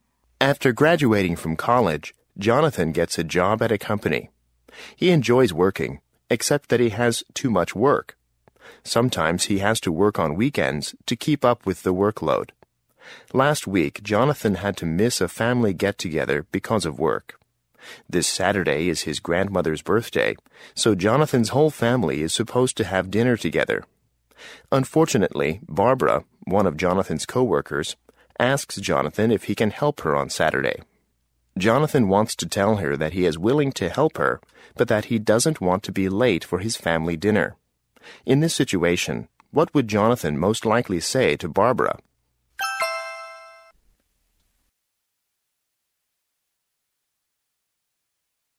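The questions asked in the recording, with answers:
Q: In this situation, what would Jonathan most likely say to Barbara?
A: I can help you, but I can't be late for my family dinner.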